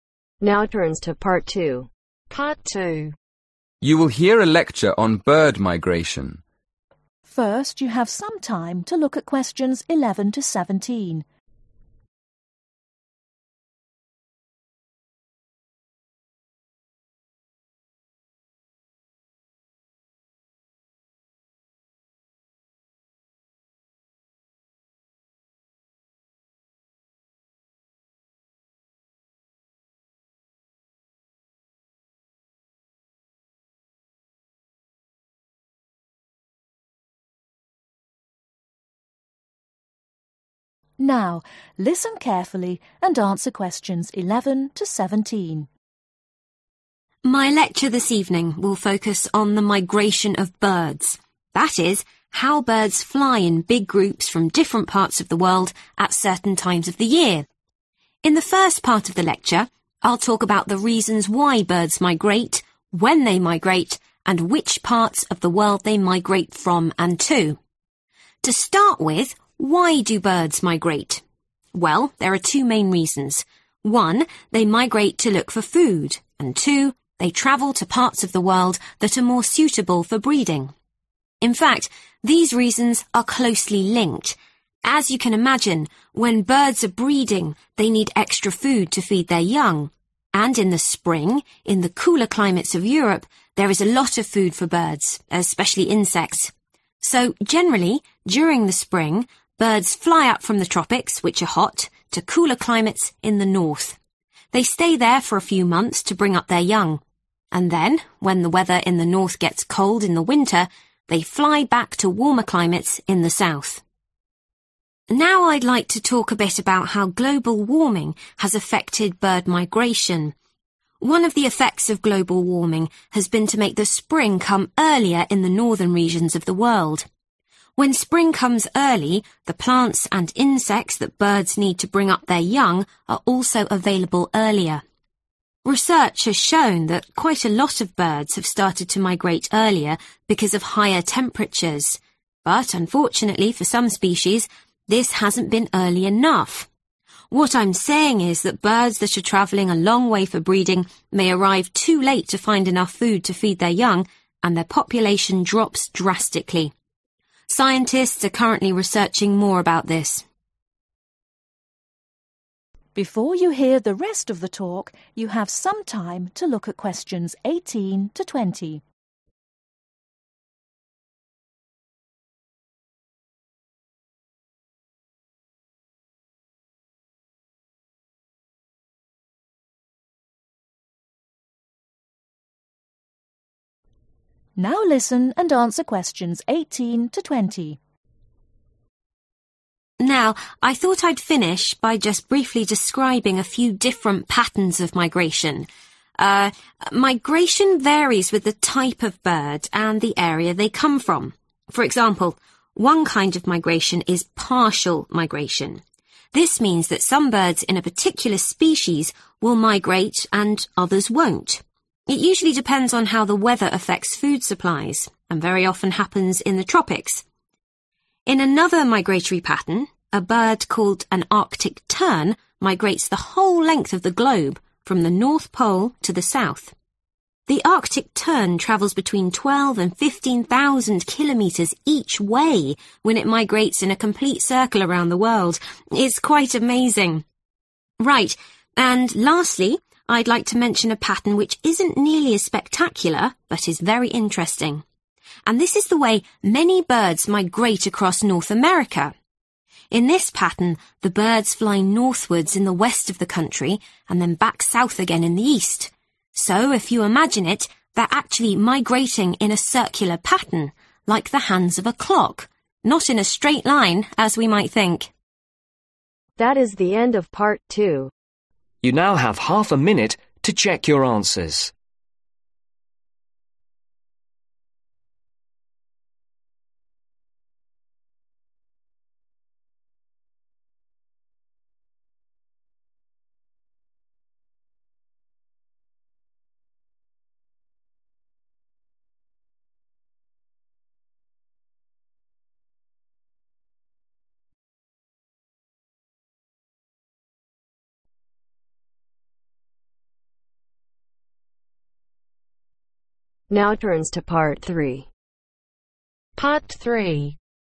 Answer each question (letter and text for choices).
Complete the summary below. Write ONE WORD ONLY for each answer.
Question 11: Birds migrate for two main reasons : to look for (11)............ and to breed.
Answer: Food

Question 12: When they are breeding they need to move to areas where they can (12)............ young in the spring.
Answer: Feed

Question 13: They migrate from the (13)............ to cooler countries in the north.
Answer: Tropics

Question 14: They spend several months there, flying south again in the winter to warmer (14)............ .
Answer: Climates

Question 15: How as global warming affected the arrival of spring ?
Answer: Comes earlier

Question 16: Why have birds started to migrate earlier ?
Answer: Higher temperatures

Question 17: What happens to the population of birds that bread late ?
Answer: Drops drastically

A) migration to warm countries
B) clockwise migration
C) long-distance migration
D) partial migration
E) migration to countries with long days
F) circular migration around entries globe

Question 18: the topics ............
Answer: D) partial migration

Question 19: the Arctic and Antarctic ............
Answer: F) circular migration around entries globe

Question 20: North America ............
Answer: B) clockwise migration